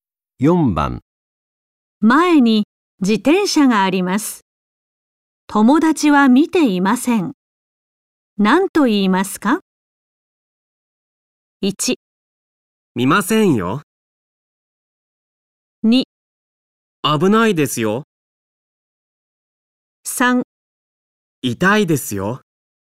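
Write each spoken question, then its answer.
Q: 前に自転車があります。友達は見ていません。何と言いますか?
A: 2: 危ないですよ。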